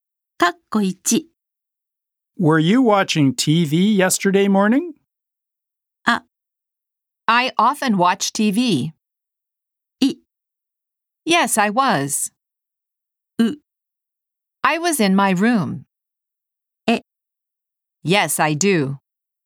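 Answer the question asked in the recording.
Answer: い: Yes, I was.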